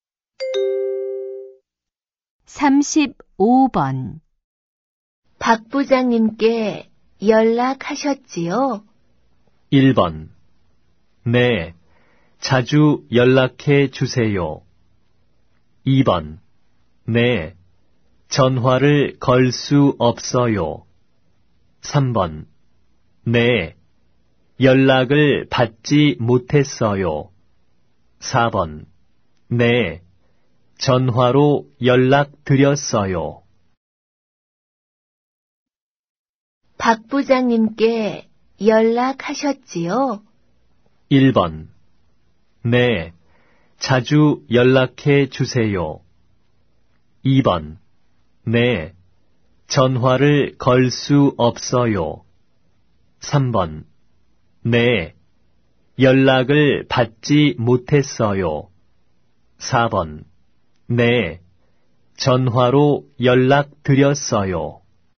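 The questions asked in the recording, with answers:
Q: 박 부장님께 연락하셨지요?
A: 4: 네. 전화로 연락드렸어요.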